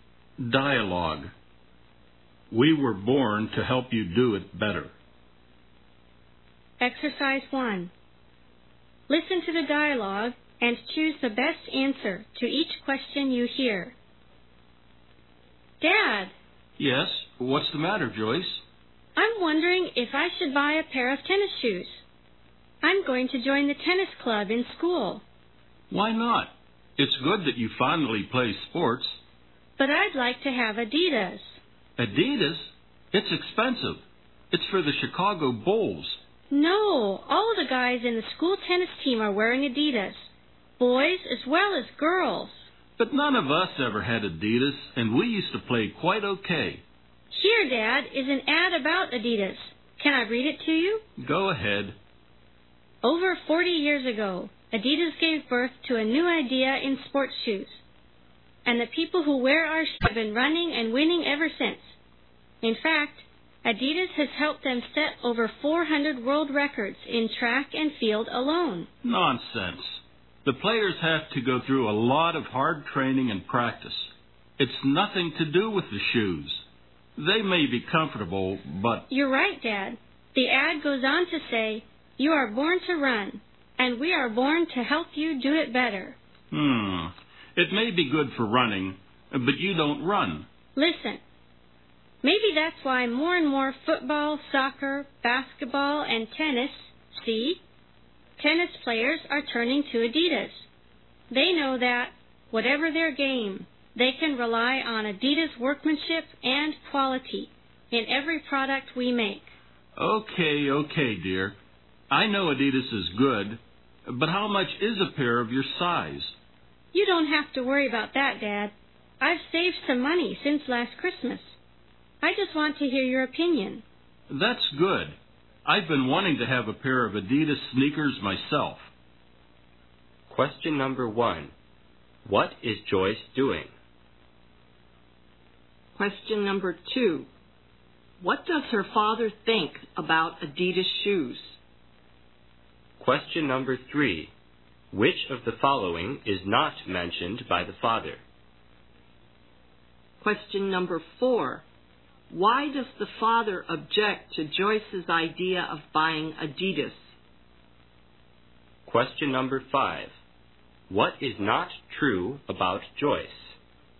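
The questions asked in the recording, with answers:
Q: What is Joyce doing?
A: Asking her father's opinion about buying Adidas tennis shoes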